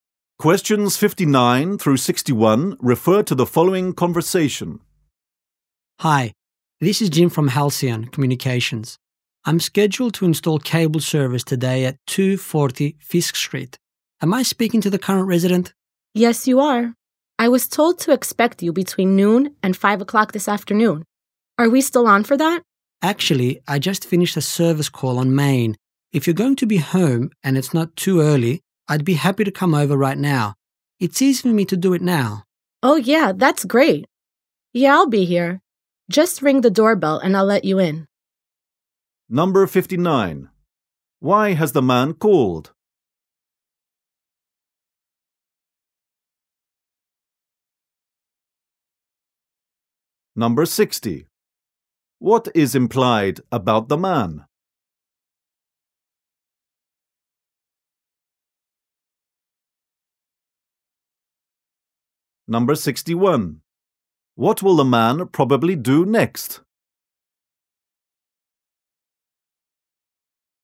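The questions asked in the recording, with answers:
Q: Why has the man called?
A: To offer to install the cable service earlier

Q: What will the man probably do next?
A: Go to 240 Fisk Street to install cable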